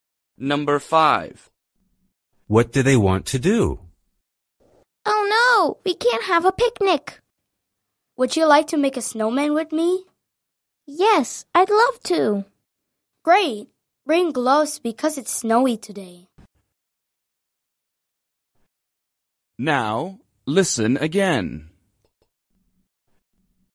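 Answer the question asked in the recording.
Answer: make a snowman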